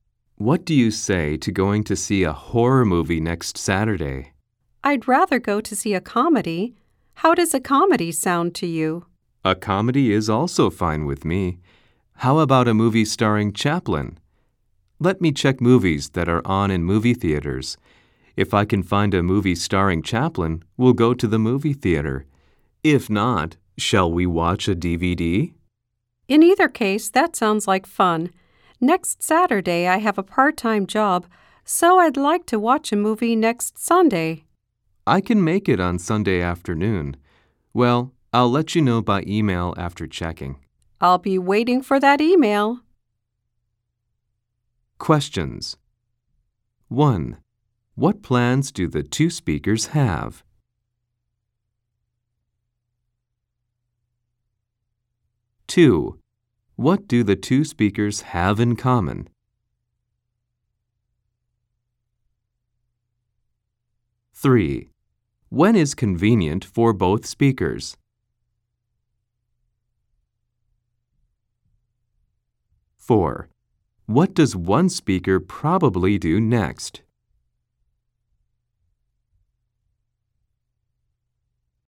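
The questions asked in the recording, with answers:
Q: What plans do the two speakers have?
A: To watch a comedy starring Chaplin, at a theater or on DVD

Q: When is convenient for both speakers?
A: Next Sunday afternoon

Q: What does one speaker probably do next?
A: Check which movies are showing and send an email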